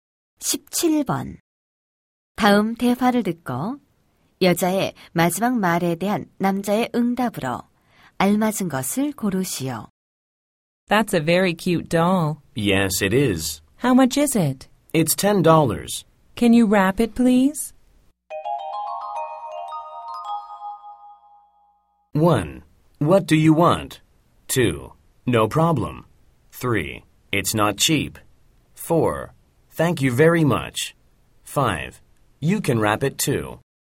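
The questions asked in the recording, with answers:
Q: 다음 대화를 듣고 여자의 마지막 말에 대한 남자의 응답으로 알맞은 것을 고르시오.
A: 2: No problem.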